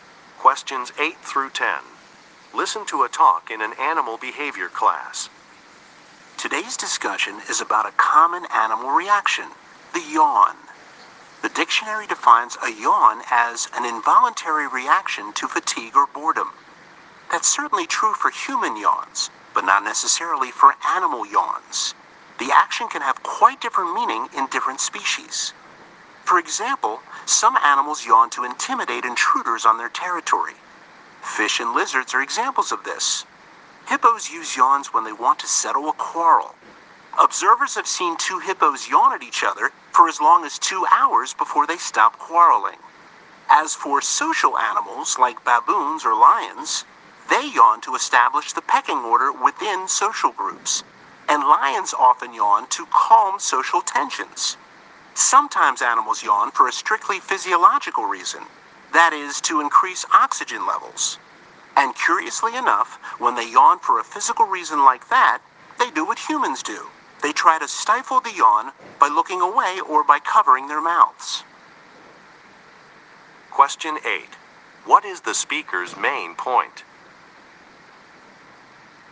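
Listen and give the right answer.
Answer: Animal yawns can have different meanings and purposes in different species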